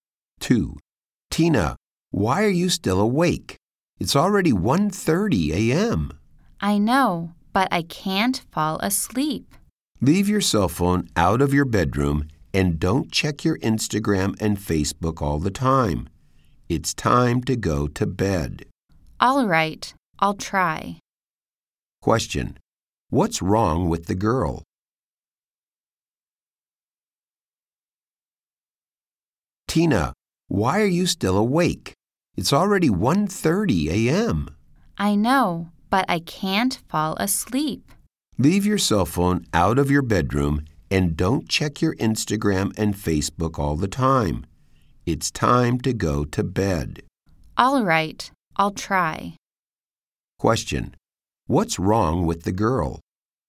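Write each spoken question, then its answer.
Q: What's wrong with the girl?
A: She can't fall asleep.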